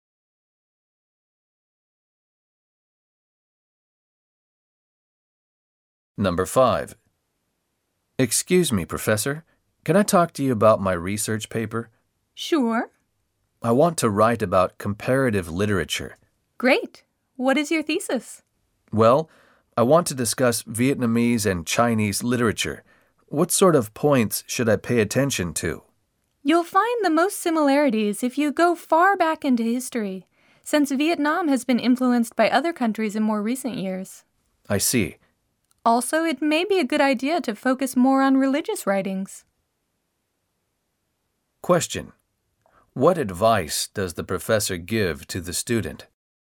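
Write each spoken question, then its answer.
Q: What advice does the professor give to the student?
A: Look far back into history and focus on religious writings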